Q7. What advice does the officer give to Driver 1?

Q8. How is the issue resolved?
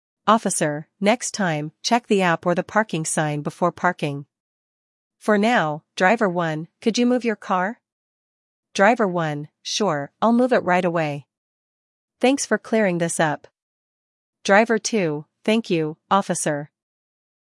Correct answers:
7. Check the app or sign before parking
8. Driver 1 moves their car

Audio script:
Officer: Next time, check the app or the parking sign before parking. For now, Driver 1, could you move your car?
Driver 1: Sure, I'll move it right away. Thanks for clearing this up.
Driver 2: Thank you, Officer.